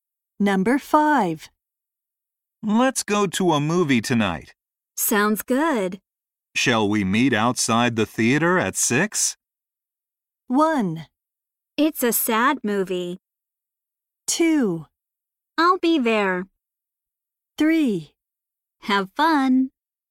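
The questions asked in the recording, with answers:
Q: Shall we meet outside the theater at 6?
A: 2: I'll be there.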